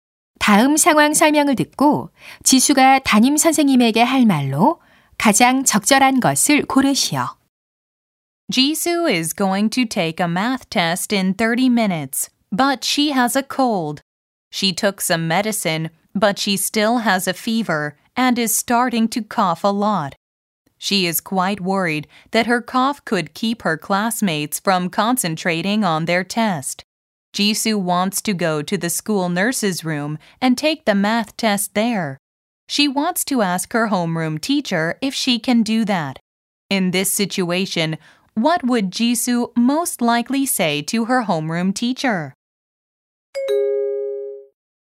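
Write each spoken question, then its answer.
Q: In this situation, what would Jisoo most likely say to her homeroom teacher?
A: Could I take the math test in the school nurse's room?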